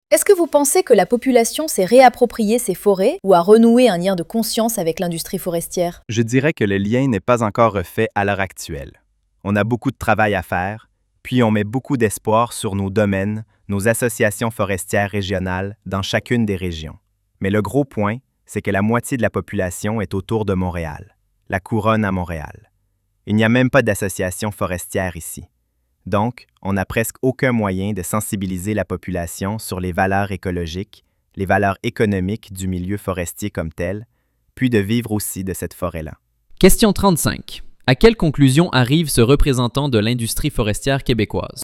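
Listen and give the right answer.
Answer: Le lien avec la forêt n'est pas encore refait, faute de moyens pour sensibiliser la population.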